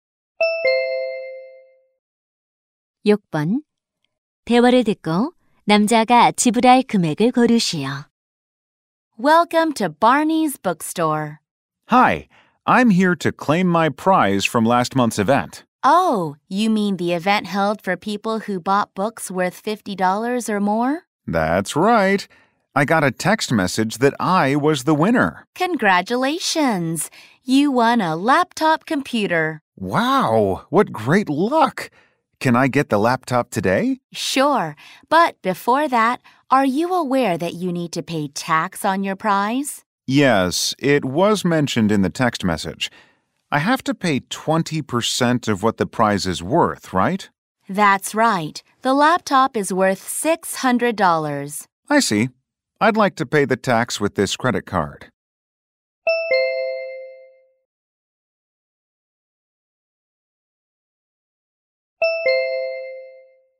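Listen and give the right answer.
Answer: $120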